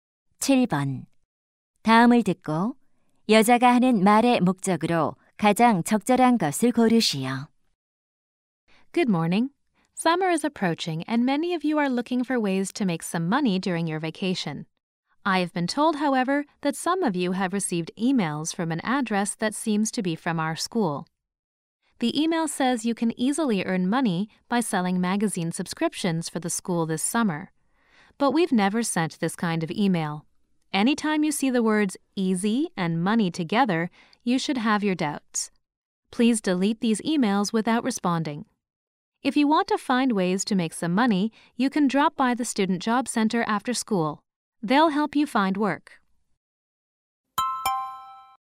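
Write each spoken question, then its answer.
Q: 다음을 듣고 여자가 하는 말의 목적으로 가장 적절한 것을 고르시오.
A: 학교를 사칭한 아르바이트 사기 이메일에 대해 주의를 당부하려고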